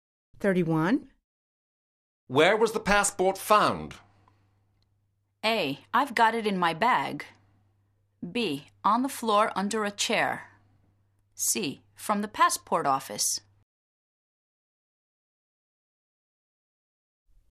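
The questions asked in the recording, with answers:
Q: Where was the passport found?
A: B: On the floor under a chair.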